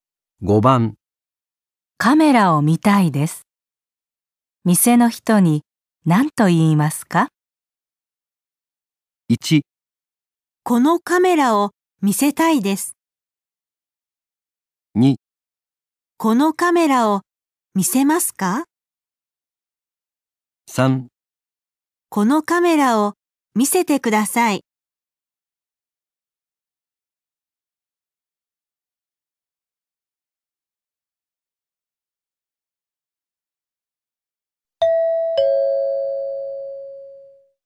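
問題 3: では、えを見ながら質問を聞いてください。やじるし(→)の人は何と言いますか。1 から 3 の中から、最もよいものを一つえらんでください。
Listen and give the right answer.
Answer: このカメラを見せてください。

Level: N5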